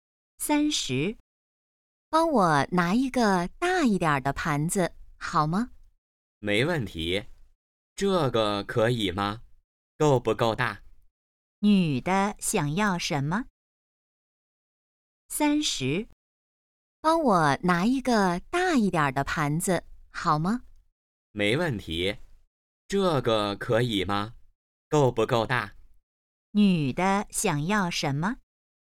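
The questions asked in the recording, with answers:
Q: 女的想要什么?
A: 一个大一点的盘子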